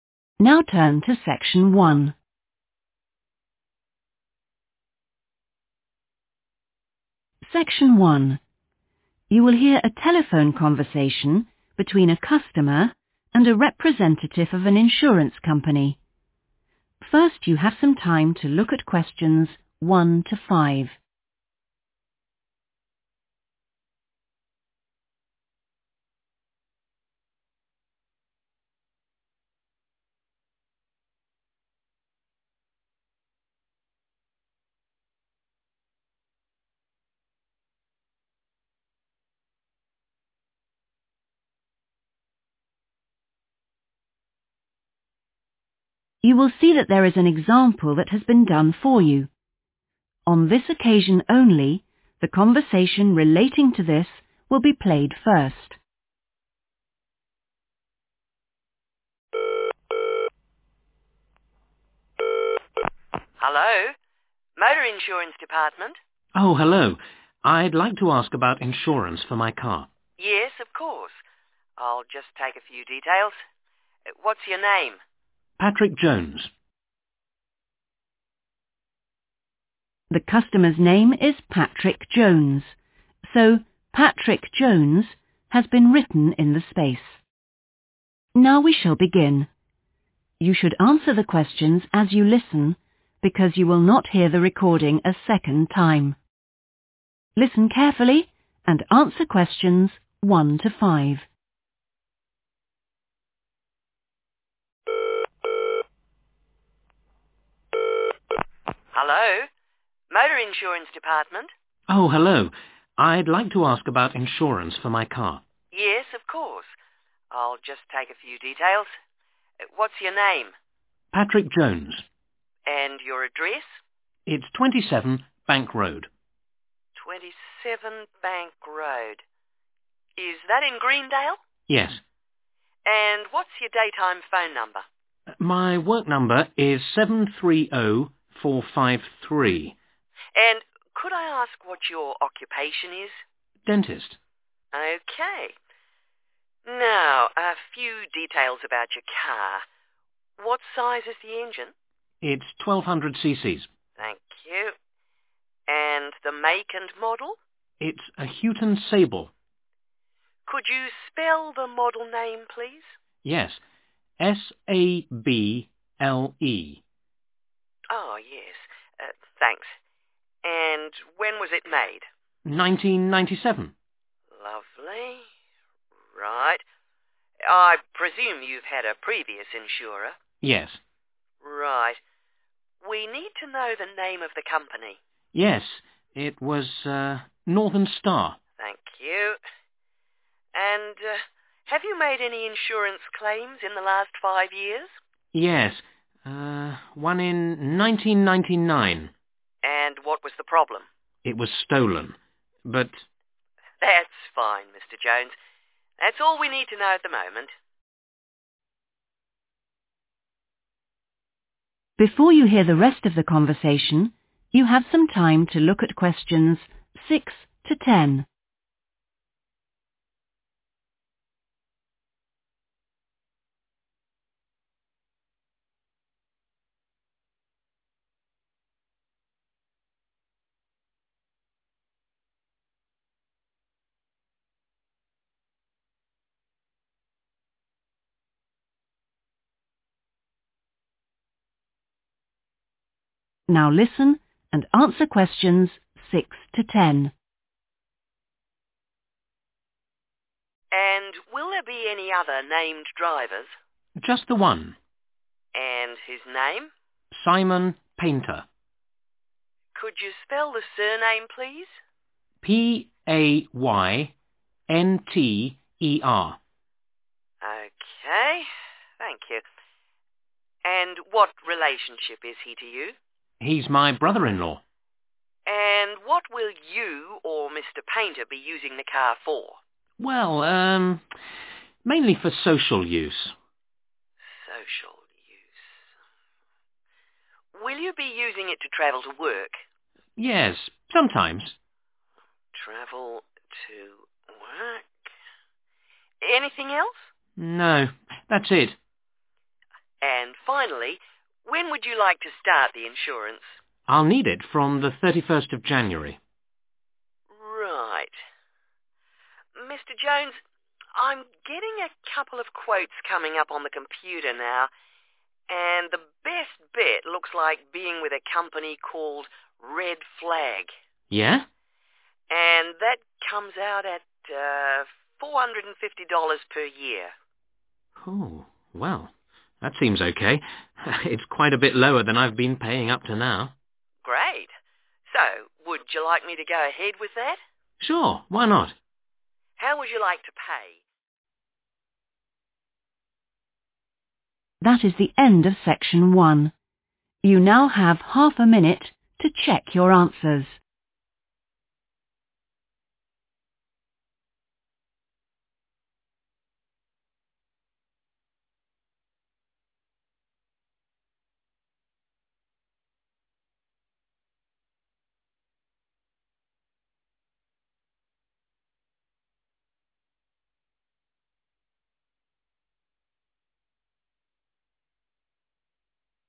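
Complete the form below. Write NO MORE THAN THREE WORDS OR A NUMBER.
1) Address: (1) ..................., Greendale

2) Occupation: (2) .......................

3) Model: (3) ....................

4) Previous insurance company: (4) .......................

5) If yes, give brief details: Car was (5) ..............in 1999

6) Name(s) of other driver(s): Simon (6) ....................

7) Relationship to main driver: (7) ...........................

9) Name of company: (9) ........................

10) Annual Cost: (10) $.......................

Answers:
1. 27 Bank Road
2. dentist
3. Sable
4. Northern Star
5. stolen
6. Paynter
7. brother-in-law
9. Red Flag
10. 450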